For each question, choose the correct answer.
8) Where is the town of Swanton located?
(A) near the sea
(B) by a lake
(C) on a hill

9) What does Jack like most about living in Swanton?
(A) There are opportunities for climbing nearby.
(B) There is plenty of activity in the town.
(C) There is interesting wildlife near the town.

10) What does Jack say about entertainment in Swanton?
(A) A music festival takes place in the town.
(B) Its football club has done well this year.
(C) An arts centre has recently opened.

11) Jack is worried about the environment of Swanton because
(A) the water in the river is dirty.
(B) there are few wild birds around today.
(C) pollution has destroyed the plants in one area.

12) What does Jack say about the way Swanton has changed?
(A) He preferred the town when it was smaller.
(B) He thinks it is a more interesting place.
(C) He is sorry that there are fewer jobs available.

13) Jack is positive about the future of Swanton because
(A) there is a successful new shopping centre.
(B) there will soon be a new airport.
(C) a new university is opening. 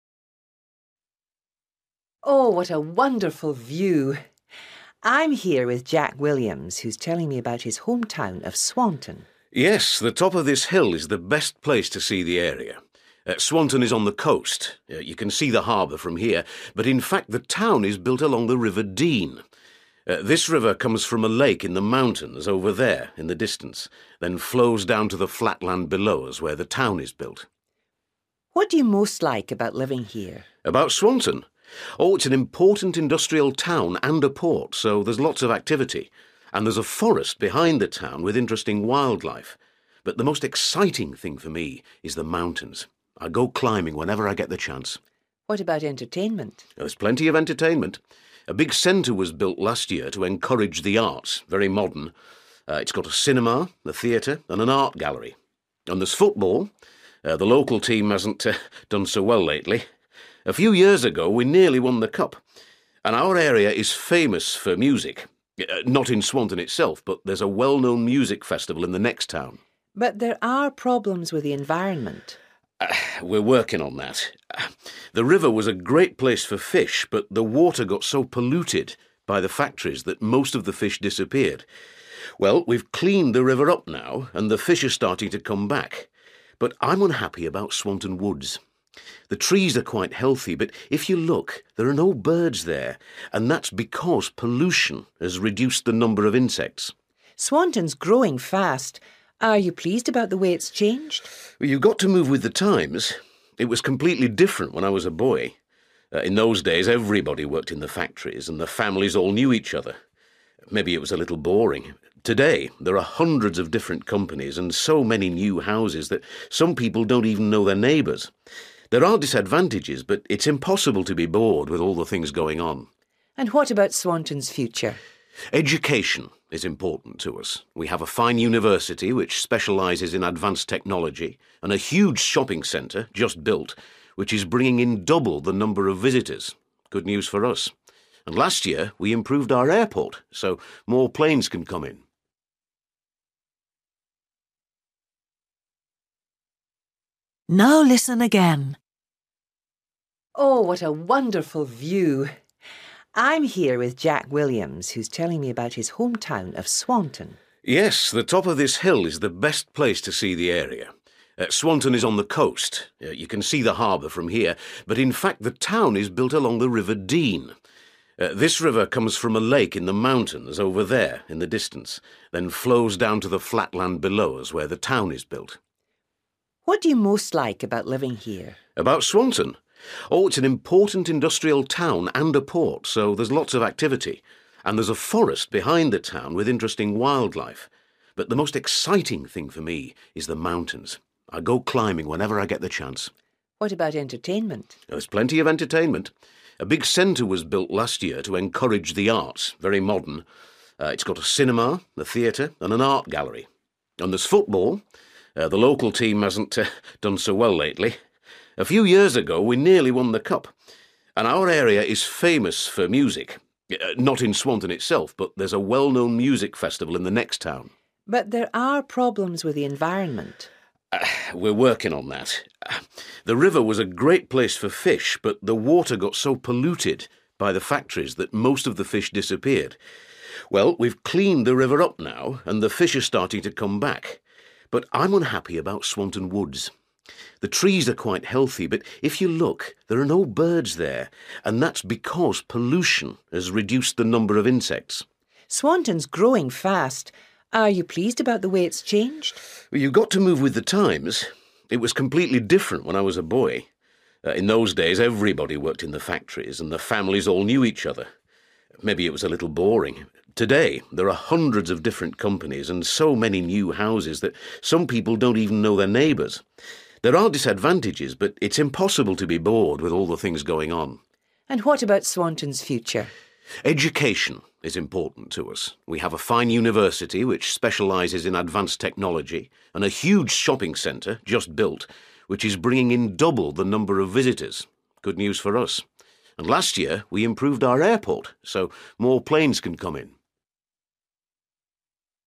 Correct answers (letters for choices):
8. A
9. A
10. C
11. B
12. B
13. A

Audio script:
Interviewer: Oh, what a wonderful view! I'm here with Jack Williams, who's telling me about his home town of Swanton.
Jack: Yes, the top of this hill is the best place to see the area. Swanton is on the coast – you can see the harbour from here – but in fact the town is built along the river Dean. This river comes from a lake in the mountains, over there in the distance, then flows down to the flat land below us where the town is built.
Interviewer: What do you most like about living here?
Jack: About Swanton? Oh, it's an important industrial town and a port, so there's lots of activity. And there's a forest behind the town with interesting wildlife. But the most exciting thing for me is the mountains. I go climbing whenever I get the chance.
Interviewer: What about entertainment?
Jack: There's plenty of entertainment. A big centre was built last year to encourage the arts – very modern. It's got a cinema, a theatre and an art gallery. And there's football. The local team hasn't done so well lately. A few years ago we nearly won the Cup. And our area is famous for music – not in Swanton itself, but there's a well-known music festival in the next town.
Interviewer: But there are problems with the environment.
Jack: We're working on that. The river was a great place for fish, but the water got so polluted by the factories that most of the fish disappeared. Well, we've cleaned the river up now, and the fish are starting to come back. But I'm unhappy about Swanton woods. The trees are quite healthy, but if you look, there are no birds there, and that's because pollution has reduced the number of insects.
Interviewer: Swanton's growing fast. Are you pleased about the way it's changed?
Jack: You've got to move with the times. It was completely different when I was a boy. In those days everybody worked in the factories, and the families all knew each other. Maybe it was a little boring. Today there are hundreds of different companies, and so many few houses that some people don't even know their neighbours. There are disadvantages, but it's impossible to be bored with all the things going on.
Interviewer: And what about Swanton's future?
Jack: Education is important to us. We have a fine university, which specialises in advanced technology. And a huge shopping centre, just built, which is bringing in double the number of visitors – good news for us. And last year we improved our airport, so more planes can come in.

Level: B1